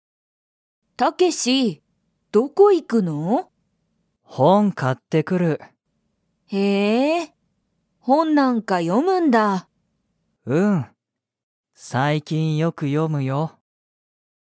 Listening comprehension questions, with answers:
タケシは、____を買かってくる。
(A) スマホ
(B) 友達ともだち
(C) 学校がっこう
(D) 本ほん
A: (D) 本ほん

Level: Level 1

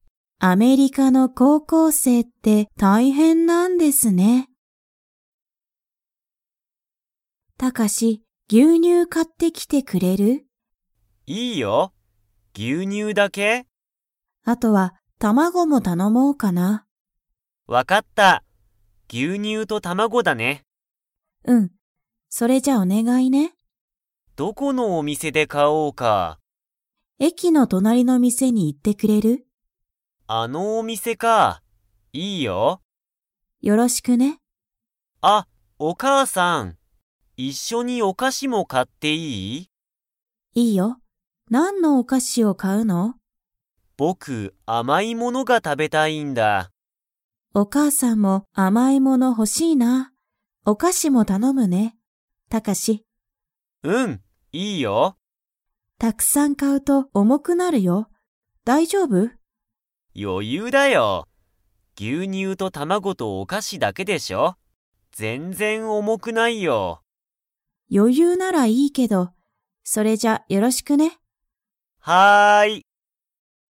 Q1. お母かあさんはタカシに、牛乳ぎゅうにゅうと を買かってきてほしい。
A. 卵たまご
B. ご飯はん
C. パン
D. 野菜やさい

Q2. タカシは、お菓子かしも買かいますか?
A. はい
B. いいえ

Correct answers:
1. A. 卵たまご
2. A. はい

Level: Level 4

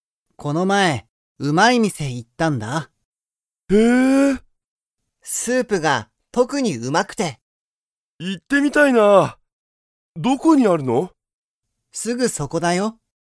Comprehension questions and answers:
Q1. その店(みせ)は、スープが____。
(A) あまり新(あたら)しくない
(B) 特(とく)にうまい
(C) 全然(ぜんぜん)おいしくない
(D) すごく安(やす)い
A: (B) 特(とく)にうまい

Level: Level 1

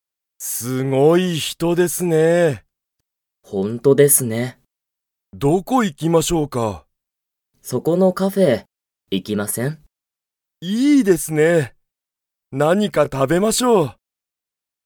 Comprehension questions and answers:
Comprehension Quiz (Skip if you don't understand the conversation yet)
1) 佐藤さとうさんと山田やまださんは、そこの__に行いく。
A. 人(ひと)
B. カフェ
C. レストラン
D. 仕事(しごと)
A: B. カフェ

